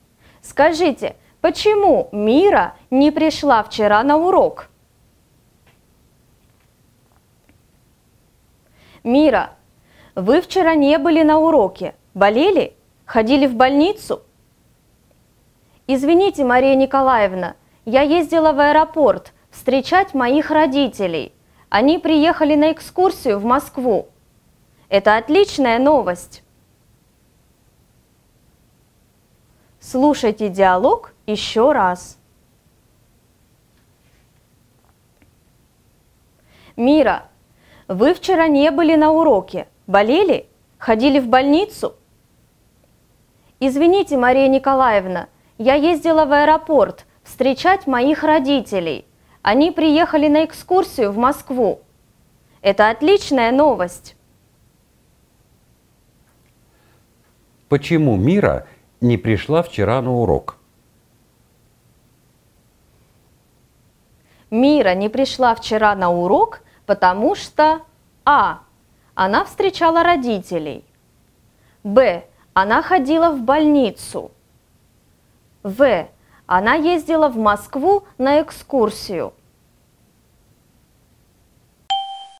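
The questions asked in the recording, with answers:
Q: Почему Мира не пришла вчера на урок?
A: А: Она встречала родителей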